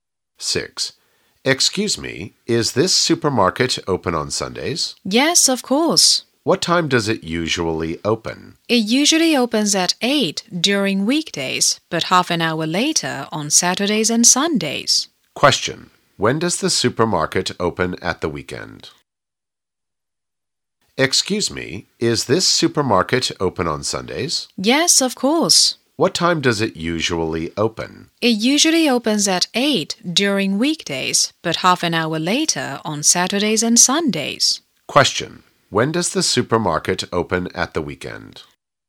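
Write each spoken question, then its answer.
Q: When does the supermarket open at the weekend?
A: At 8:30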